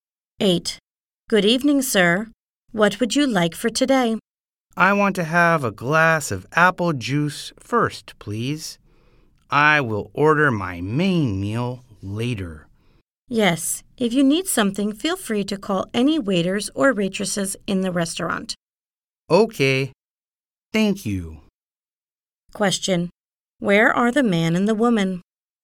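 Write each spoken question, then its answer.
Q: Where are the man and the woman?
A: In a restaurant.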